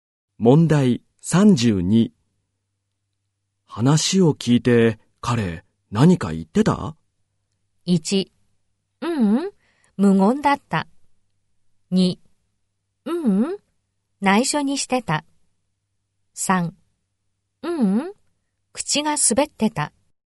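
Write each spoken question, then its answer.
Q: 話を聞いて彼何か言ってた?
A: 1: ううん、無言だった。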